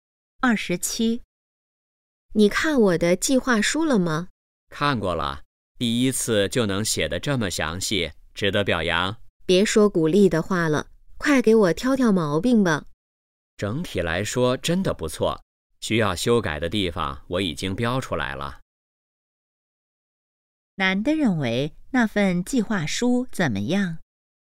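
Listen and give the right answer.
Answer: 写得很详细,整体不错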